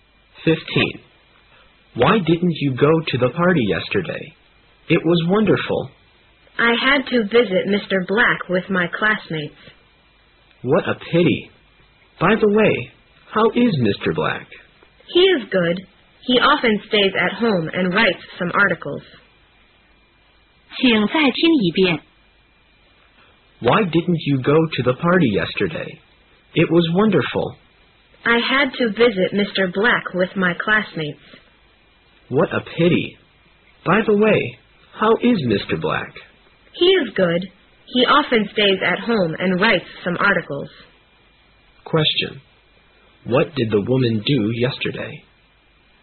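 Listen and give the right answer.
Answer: She visited Mr. Black with her classmates.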